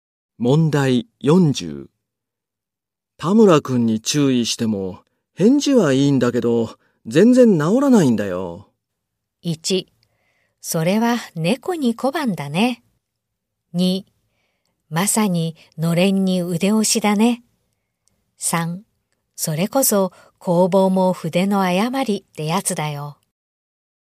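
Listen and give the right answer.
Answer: 2: まさにのれんに腕押しだね。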